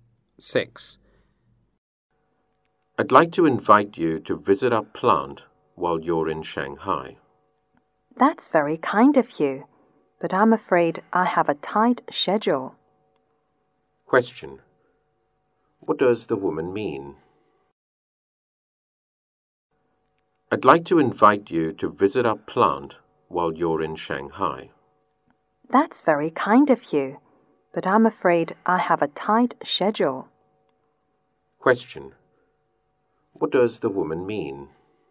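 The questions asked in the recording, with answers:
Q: Question. What does the woman mean?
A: She can't visit the plant because her schedule is tight.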